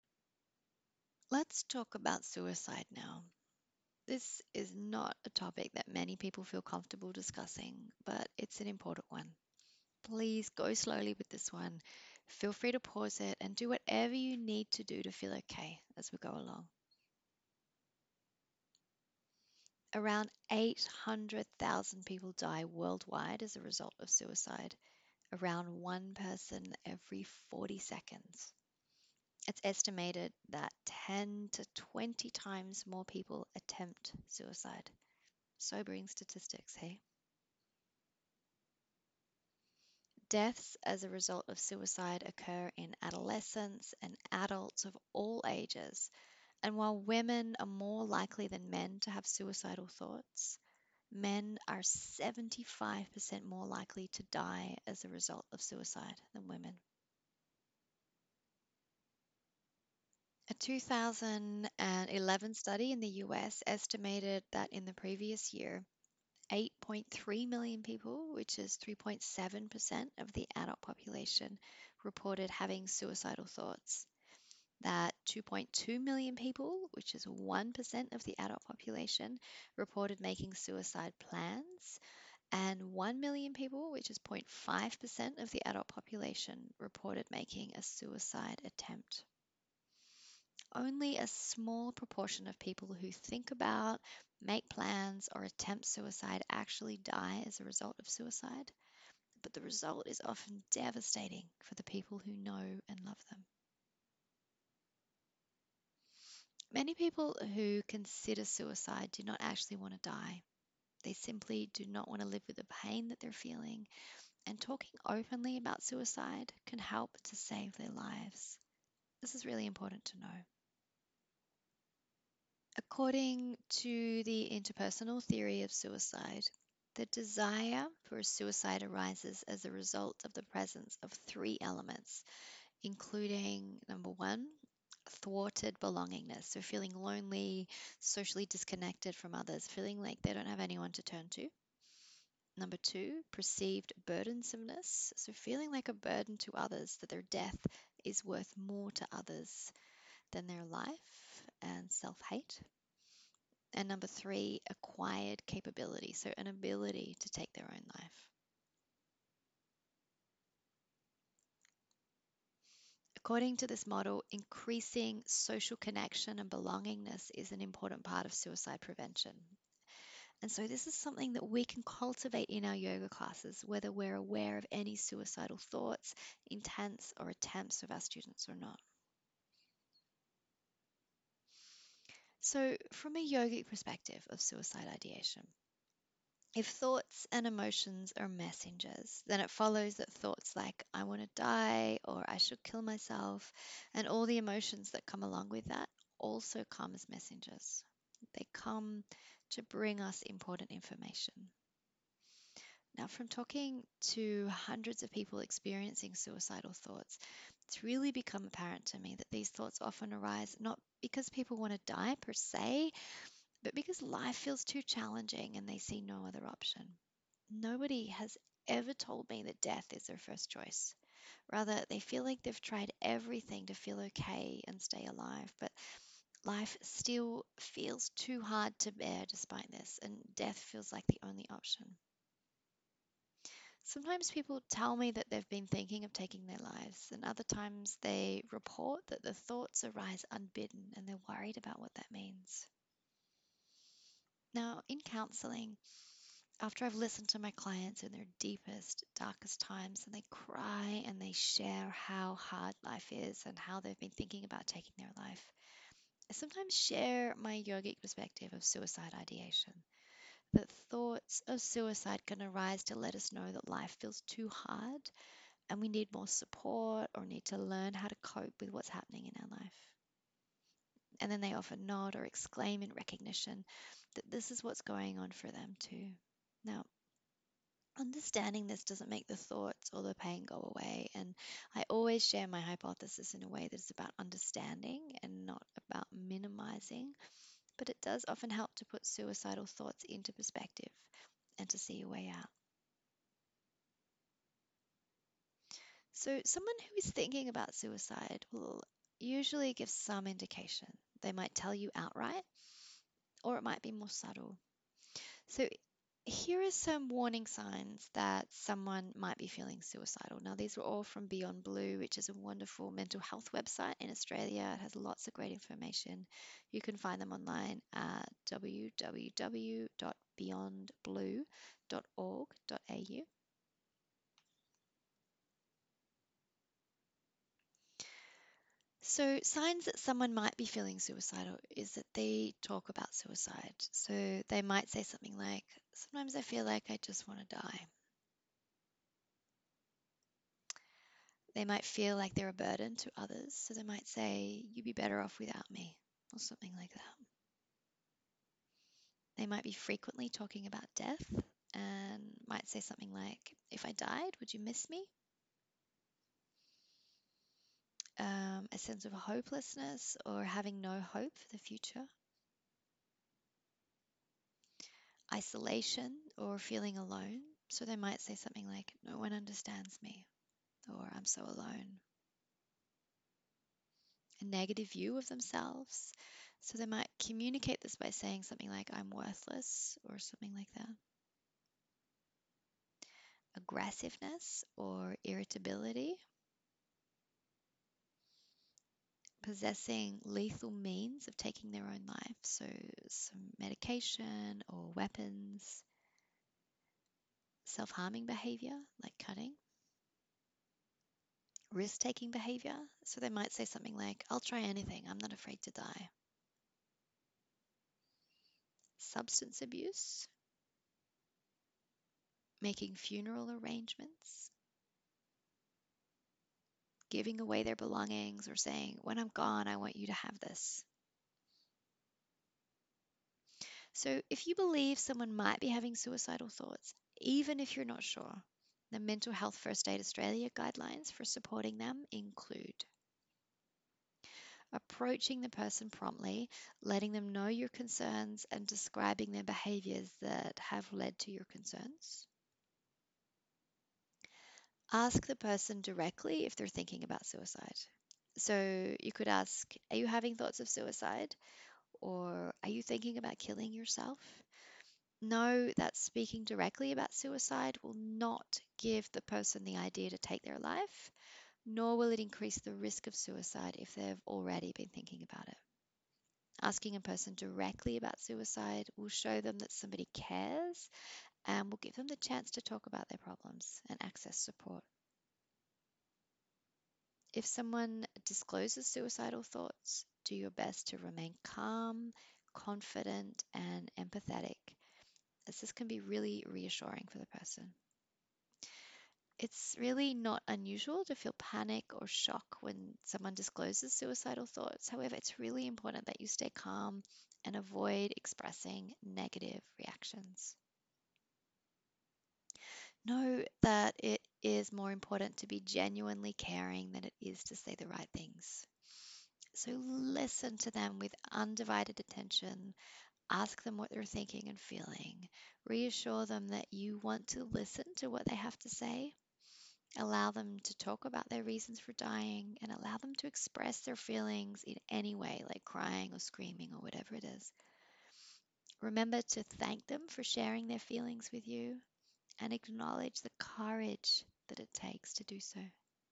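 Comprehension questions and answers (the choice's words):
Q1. According to the Interpersonal Theory of Suicide, the desire for suicide arises as a result of:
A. Personality disorder, perceived burdensomeness and acquired capacity.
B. Thwarted belongingness, perceived burdensomeness and attention seeking.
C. Thwarted belongingness, perceived burdensomeness and acquired capacity.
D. All of the above.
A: Thwarted belongingness, perceived burdensomeness and acquired capacity.

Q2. What are signs that someone might be feeling suicidal?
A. Talking about suicide, they might say something like 'sometimes I feel like I just want to die.'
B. Self-harming behaviour, like cutting.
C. Giving away their belongings, or saying 'when I'm gone I want you to have this'.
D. All of the above.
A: All of the above.

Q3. What could you do if you believe someone might be considering suicide?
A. Nothing, it's probably attention-seeking behaviour that is better off ignored.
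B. Nothing, talking about suicide with someone might make them more likely to take their own life.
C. Nothing, it might be their karma to take their own life, and it's not your place to interrupt this.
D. Approach them, let them know your concerns, and take action based on the Mental Health First Aid Australia guidelines.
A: Approach them, let them know your concerns, and take action based on the Mental Health First Aid Australia guidelines.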